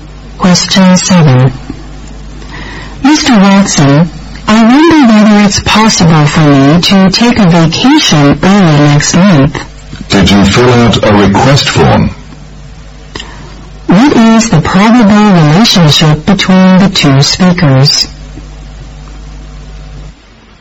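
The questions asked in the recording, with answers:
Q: What is the probable relationship between the two speakers?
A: Employee and employer (boss)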